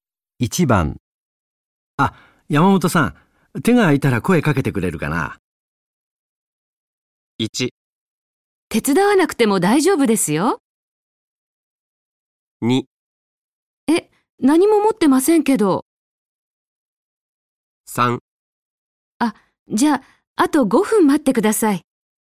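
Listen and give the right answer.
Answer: 3: あ、じゃあ、あと5分待ってください。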